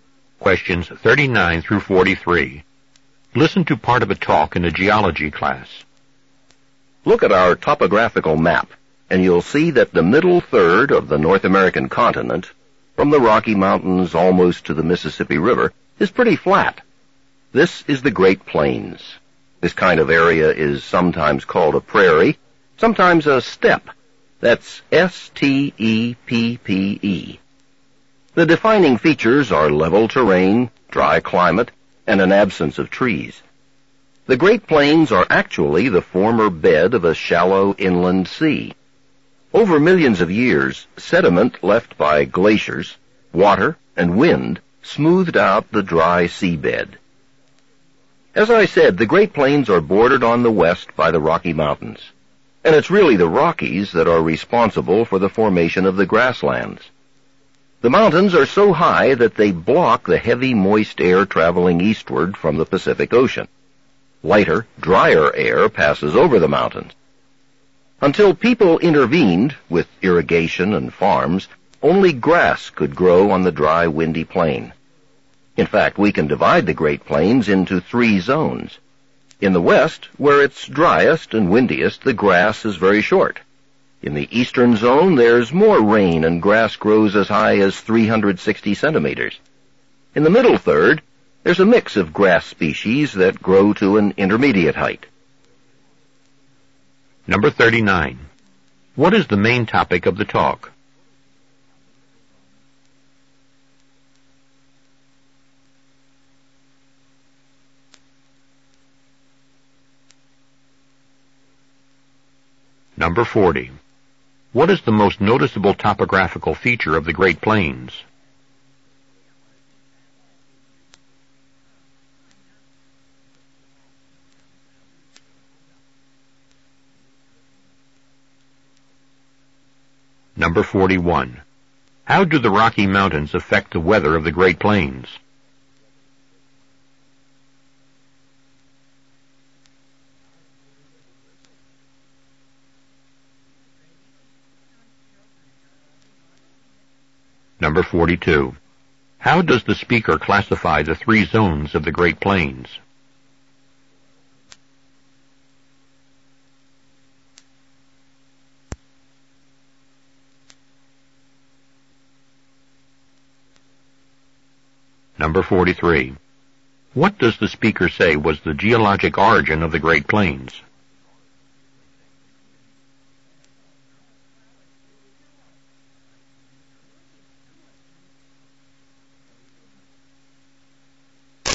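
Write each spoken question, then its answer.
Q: What is the main topic of the talk?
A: The formation and features of the Great Plains

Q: What is the most noticeable topographical feature of the Great Plains?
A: It is flat (level terrain)

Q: How do the Rocky Mountains affect the weather of the Great Plains?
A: They block moist Pacific air, making the plains dry

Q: How does the speaker classify the three zones of the Great Plains?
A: By the height of the grass

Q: What does the speaker say was the geologic origin of the Great Plains?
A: The bed of a former shallow inland sea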